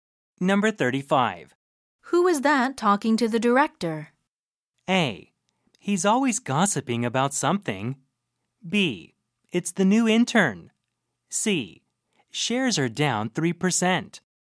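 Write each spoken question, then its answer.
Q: Who is that talking to the director?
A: B: It's the new intern.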